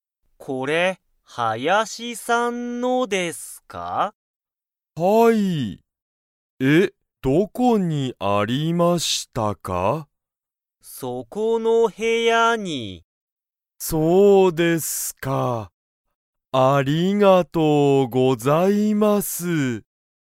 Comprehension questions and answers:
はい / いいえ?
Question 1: それは、林(はやし)さんのですか?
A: はい

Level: Level 1